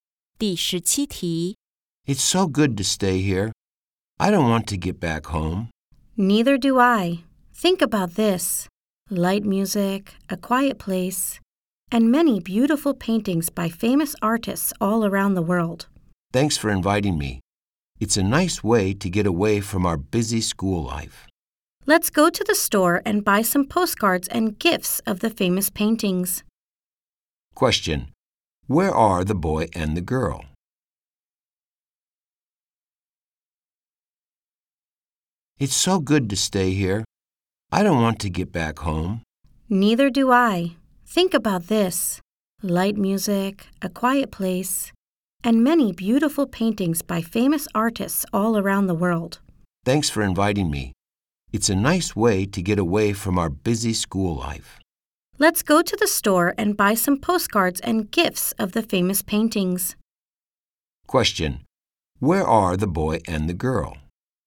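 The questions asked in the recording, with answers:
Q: Question: Where are the boy and the girl?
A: In an art museum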